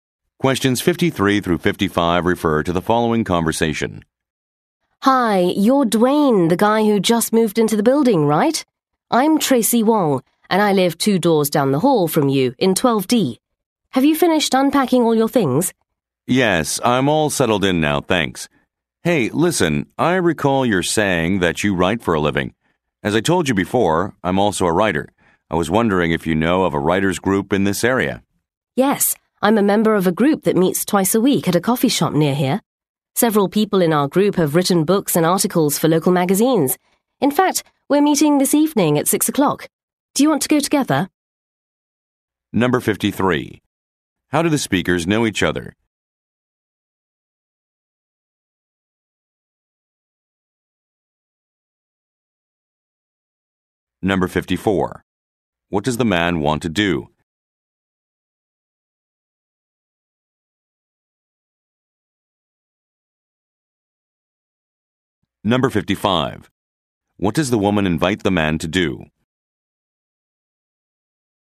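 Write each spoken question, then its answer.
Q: How do the speakers know each other?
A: They live in the same building

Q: What does the man want to do?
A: Find a writers' group

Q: What does the woman invite the man to do?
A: Go to her writers' group meeting this evening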